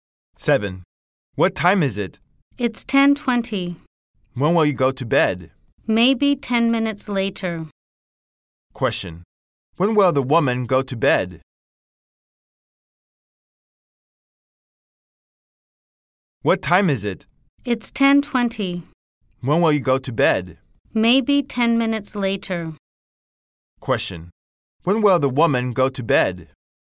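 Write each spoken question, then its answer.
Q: When will the woman go to bed?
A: At 10:30.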